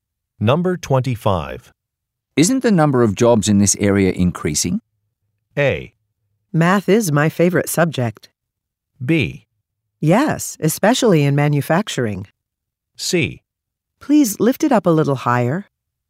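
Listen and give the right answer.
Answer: B: Yes, especially in manufacturing.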